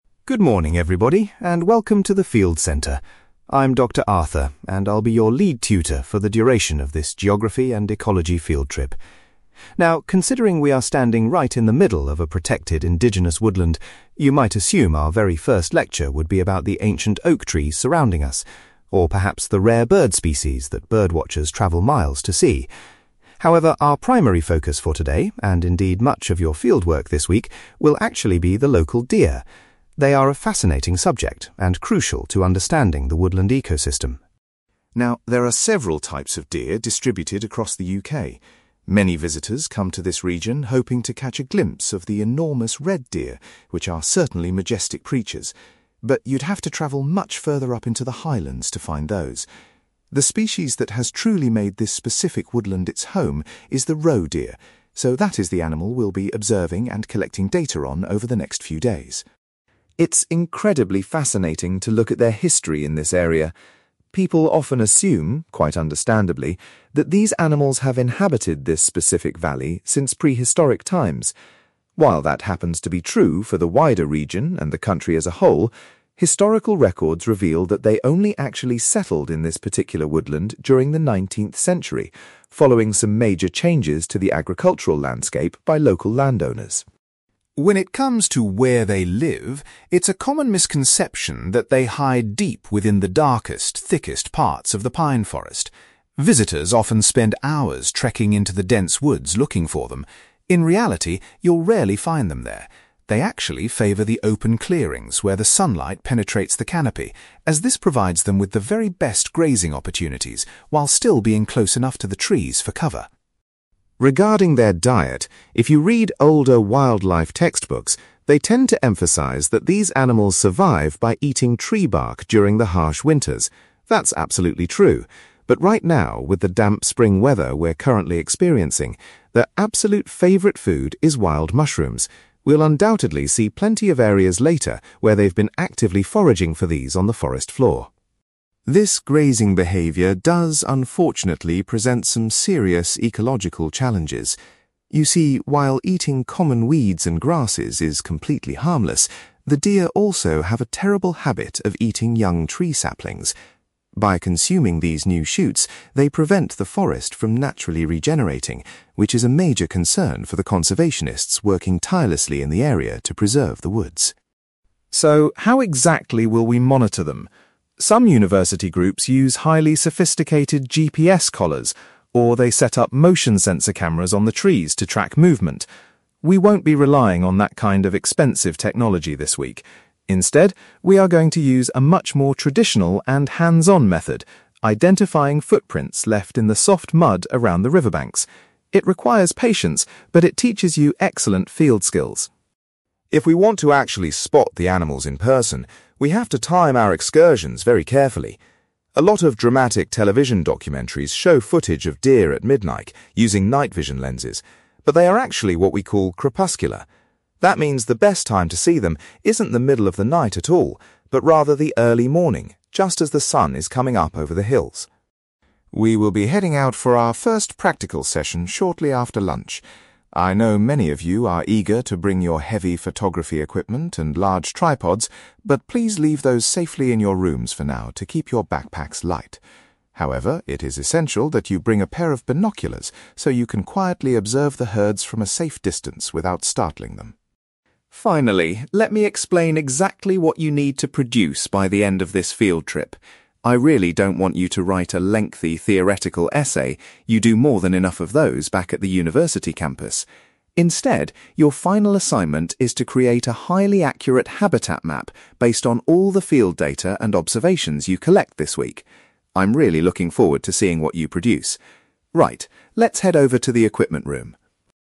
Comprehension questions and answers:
You will hear a university tutor called Dr. Arthur giving a lecture to a group of students about a geography field trip to study deer. For questions 9-18, complete the sentences with a word or short phrase.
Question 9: Dr. Arthur says that instead of rare birds, the students will focus their research on the local (9)........................... .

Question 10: The students will be specifically observing a species known as the (10)........................... during their time in the woodland.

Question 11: Historical documents indicate that the animals first arrived in this specific woodland in the (11)........................... .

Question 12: Dr. Arthur points out that the deer prefer to spend their time in (12)........................... rather than in dense forest areas.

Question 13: In the current spring season, the deer's diet consists mainly of (13)........................... .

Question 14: The deer are causing problems for conservationists because they consume young (14)........................... .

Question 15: The students will track the deer by looking for their (15)........................... near the riverbanks.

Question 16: According to Dr. Arthur, the most suitable time to actually observe the deer is in the (16)........................... .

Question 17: For the afternoon session, Dr. Arthur tells the students it is vital to take (17)........................... with them.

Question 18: At the end of the trip, the students are required to submit a (18)........................... instead of a traditional essay.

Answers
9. deer
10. roe deer
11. 19th century
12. open clearings
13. wild mushrooms
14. tree saplings
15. footprints
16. early morning
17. binoculars
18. habitat map

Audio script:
Dr. Arthur: Good morning, everybody, and welcome to the field centre. I'm Dr. Arthur, and I'll be your lead tutor for the duration of this geography and ecology field trip. Now, considering we are standing right in the middle of a protected indigenous woodland, you might assume our very first lecture would be about the ancient oak trees surrounding us, or perhaps the rare bird species that birdwatchers travel miles to see. However, our primary focus for today, and indeed much of your fieldwork this week, will actually be the local deer. They are a fascinating subject and crucial to understanding the woodland ecosystem.
Now, there are several types of deer distributed across the UK. Many visitors come to this region hoping to catch a glimpse of the enormous red deer, which are certainly majestic creatures. But you'd have to travel much further up into the highlands to find those. The species that has truly made this specific woodland its home is the roe deer, so that is the animal we'll be observing and collecting data on over the next few days.
It's incredibly fascinating to look at their history in this area. People often assume, quite understandably, that these animals have inhabited this specific valley since prehistoric times. While that happens to be true for the wider region and the country as a whole, historical records reveal that they only actually settled in this particular woodland during the 19th century, following some major changes to the agricultural landscape by local landowners.
When it comes to where they live, it's a common misconception that they hide deep within the darkest, thickest parts of the pine forest. Visitors often spend hours trekking into the dense woods looking for them. In reality, you'll rarely find them there. They actually favour the open clearings where the sunlight penetrates the canopy, as this provides them with the very best grazing opportunities while still being close enough to the trees for cover.
Regarding their diet, if you read older wildlife textbooks, they tend to emphasize that these animals survive by eating tree bark during the harsh winters. That's absolutely true, but right now, with the damp spring weather we're currently experiencing, their absolute favourite food is wild mushrooms. We'll undoubtedly see plenty of areas later where they've been actively foraging for these on the forest floor.
This grazing behaviour does, unfortunately, present some serious ecological challenges. You see, while eating common weeds and grasses is completely harmless, the deer also have a terrible habit of eating young tree saplings. By consuming these new shoots, they prevent the forest from naturally regenerating, which is a major concern for the conservationists working tirelessly in the area to preserve the woods.
So, how exactly will we monitor them? Some university groups use highly sophisticated GPS collars, or they set up motion-sensor cameras on the trees to track movement. We won't be relying on that kind of expensive technology this week. Instead, we are going to use a much more traditional and hands-on method: identifying footprints left in the soft mud around the riverbanks. It requires patience, but it teaches you excellent field skills.
If we want to actually spot the animals in person, we have to time our excursions very carefully. A lot of dramatic television documentaries show footage of deer at midnight using night-vision lenses, but they are actually what we call crepuscular. That means the best time to see them isn't the middle of the night at all, but rather the early morning, just as the sun is coming up over the hills.
We will be heading out for our first practical session shortly after lunch. I know many of you are eager to bring your heavy photography equipment and large tripods, but please leave those safely in your rooms for now to keep your backpacks light. However, it is essential that you bring a pair of binoculars so you can quietly observe the herds from a safe distance without startling them.
Finally, let me explain exactly what you need to produce by the end of this field trip. I really don't want you to write a lengthy theoretical essay; you do more than enough of those back at the university campus! Instead, your final assignment is to create a highly accurate habitat map based on all the field data and observations you collect this week. I'm really looking forward to seeing what you produce. Right, let's head over to the equipment room.

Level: B2